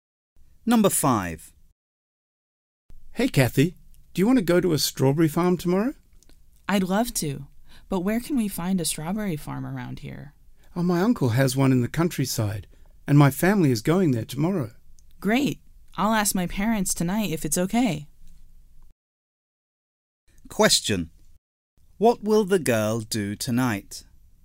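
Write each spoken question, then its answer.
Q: What will the girl do tonight?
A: Ask her parents if she can go to the strawberry farm.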